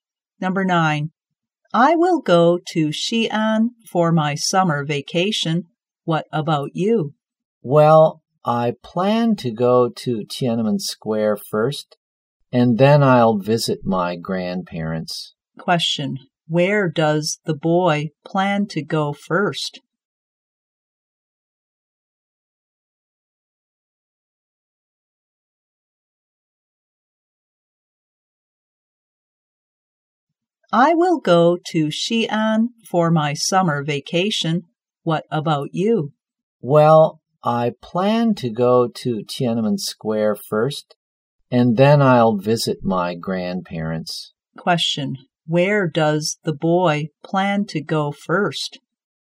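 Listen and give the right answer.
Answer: Tiananmen Square.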